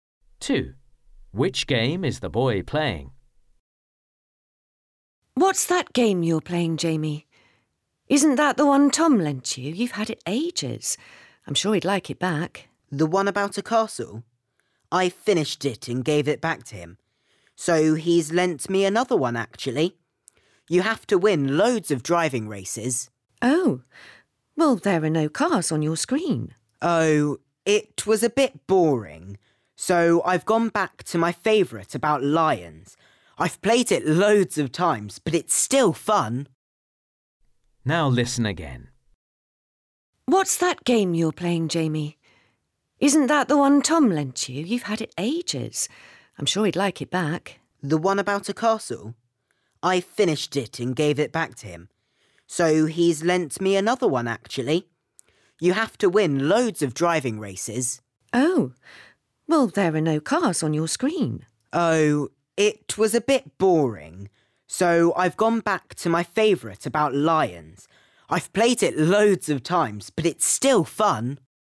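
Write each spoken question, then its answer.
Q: Which game is the boy playing?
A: His favourite game, about lions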